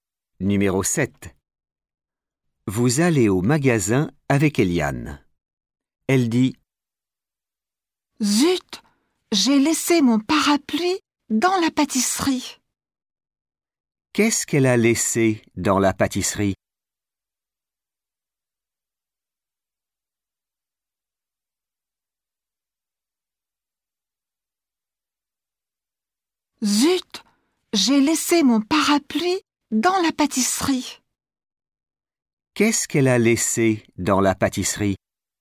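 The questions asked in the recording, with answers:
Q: Qu'est-ce qu'elle a laissé dans la pâtisserie ?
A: Son parapluie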